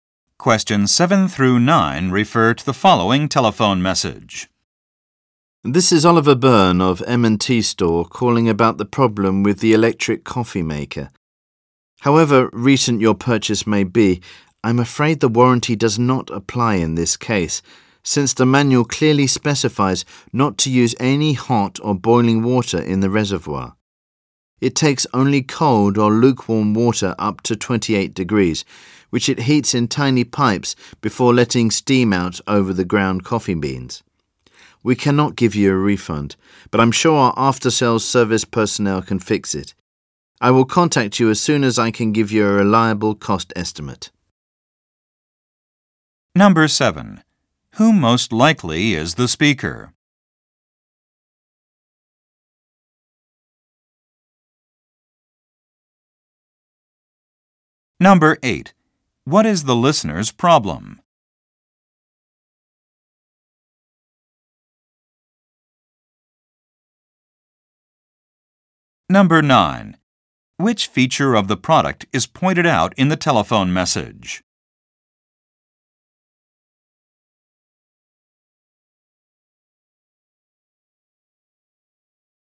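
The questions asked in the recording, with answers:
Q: Who most likely is the speaker?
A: A store employee

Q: What is the listener's problem?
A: The coffee maker is broken after using hot water

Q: Which feature of the product is pointed out in the telephone message?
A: It takes only cold or lukewarm water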